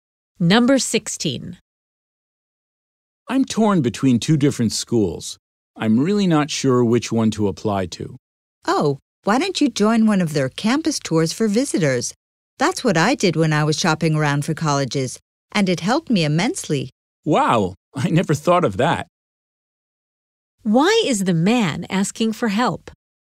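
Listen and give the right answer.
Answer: He can't decide which of two schools to apply to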